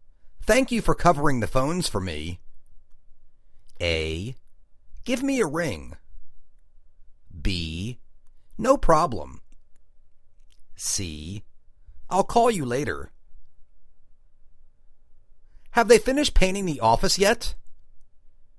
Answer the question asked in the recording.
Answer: No problem.